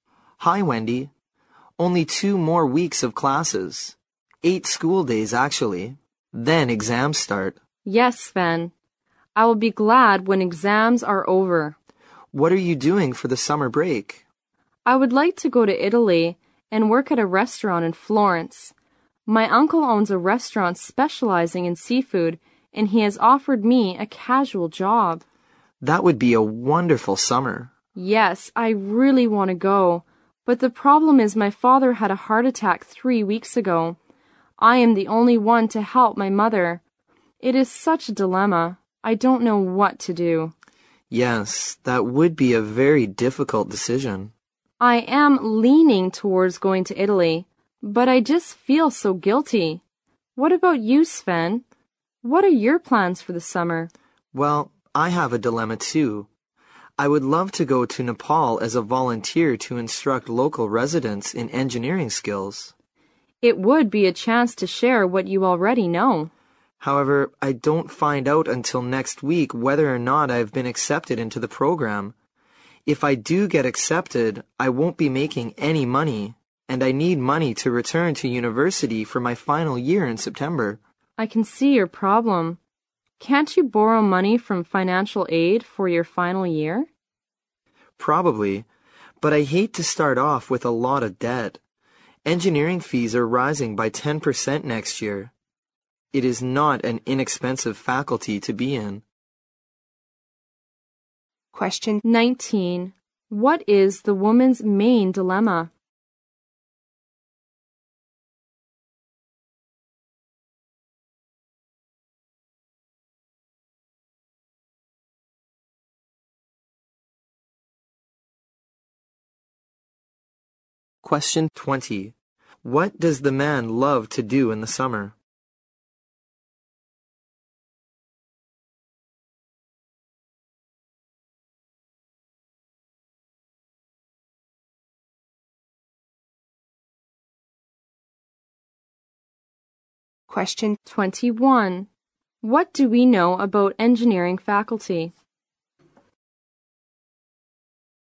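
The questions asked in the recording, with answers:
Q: What is the woman's main dilemma?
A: Whether to work in Italy for the summer or stay home to help her mother after her father's heart attack

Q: What does the man love to do in the summer?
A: Volunteer in Nepal teaching local residents engineering skills

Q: What do we know about engineering faculty?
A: Its fees are rising by 10% next year; it is expensive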